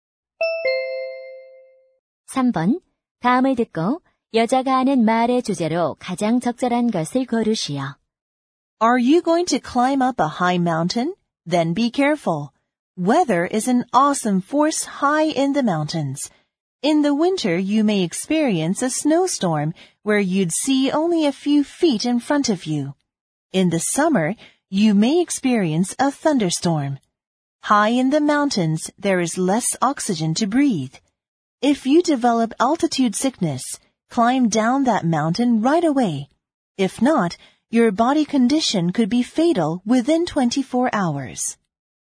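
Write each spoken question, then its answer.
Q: 다음을 듣고 여자가 하는 말의 주제로 가장 적절한 것을 고르시오.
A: 높은 산을 오를 때의 위험(날씨, 고산병)에 대한 주의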